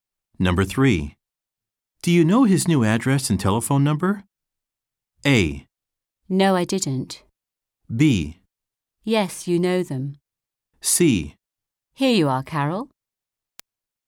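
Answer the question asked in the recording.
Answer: C: Here you are, Carol.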